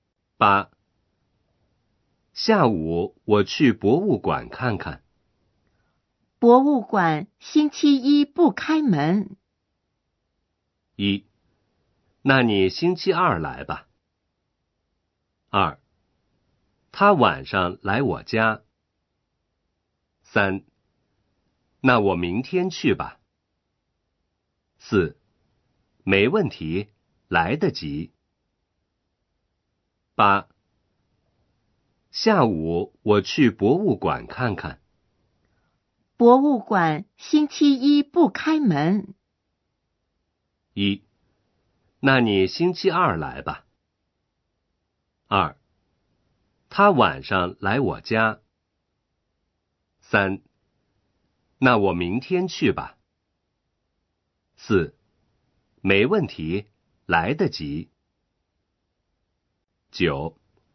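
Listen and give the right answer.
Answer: 3: 那我明天去吧。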